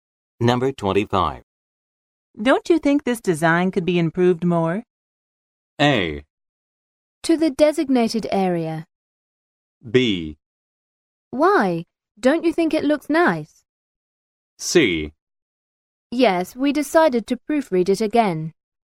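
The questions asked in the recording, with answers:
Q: Don't you think this design could be improved more?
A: B: Why? Don't you think it looks nice?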